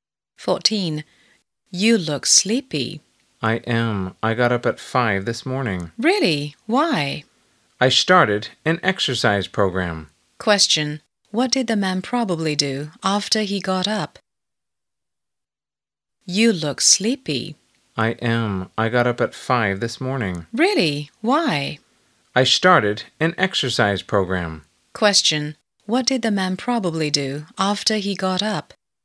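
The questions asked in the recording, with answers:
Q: what did the man probably do after he got up?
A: He did exercise.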